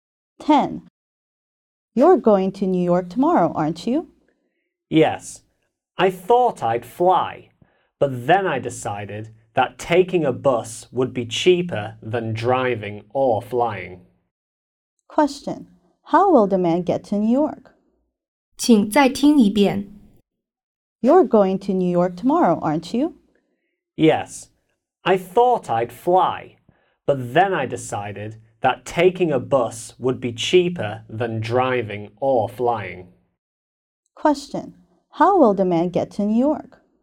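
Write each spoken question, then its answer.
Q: How will the man get to New York?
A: By bus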